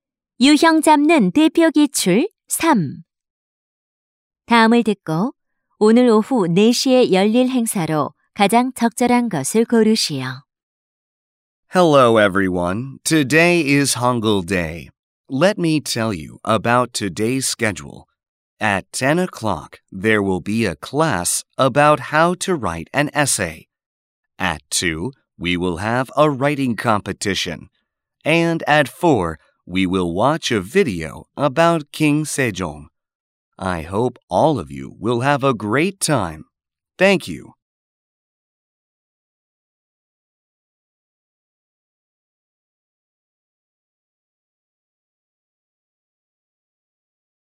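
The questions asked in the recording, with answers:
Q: 다음을 듣고 오늘 오후 4시에 열릴 행사로 가장 적절한 것을 고르시오.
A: 세종대왕에 관한 영상 시청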